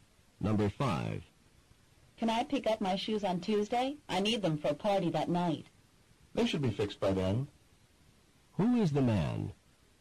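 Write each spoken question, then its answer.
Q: Who is the man?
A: A shoe repairer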